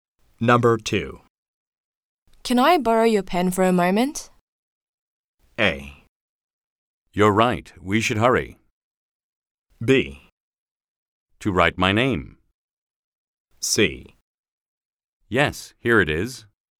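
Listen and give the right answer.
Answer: C: Yes, here it is.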